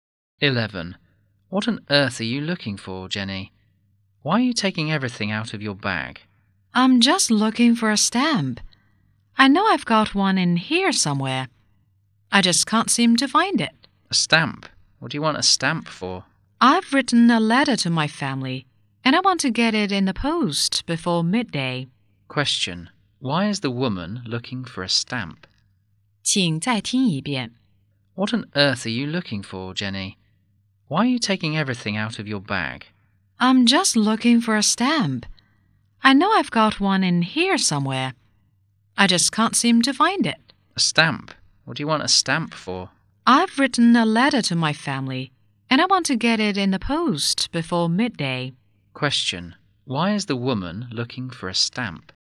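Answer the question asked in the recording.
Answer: To post a letter to her family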